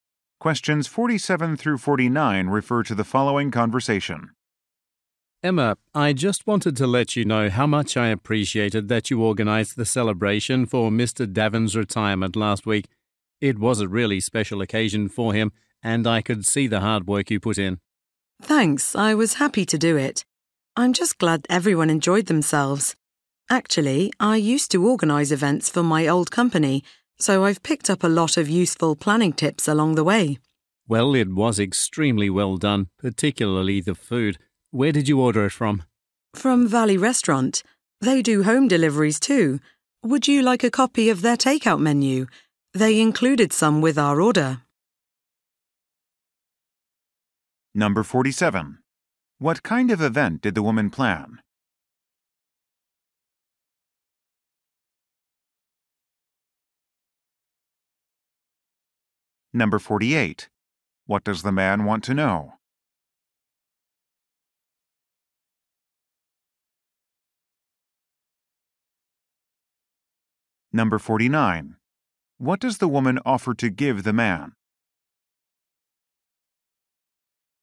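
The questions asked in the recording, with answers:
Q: What kind of event did the woman plan?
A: A retirement celebration.

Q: What does the man want to know?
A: Where the food was ordered from.

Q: What does the woman offer to give the man?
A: A copy of the restaurant's takeout menu.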